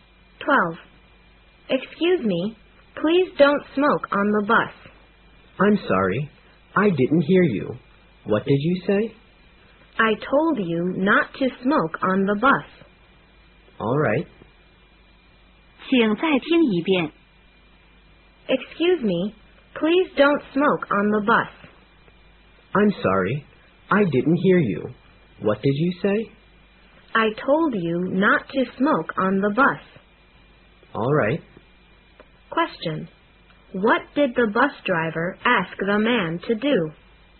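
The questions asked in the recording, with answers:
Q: What did the bus driver ask the man to do?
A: Not to smoke on the bus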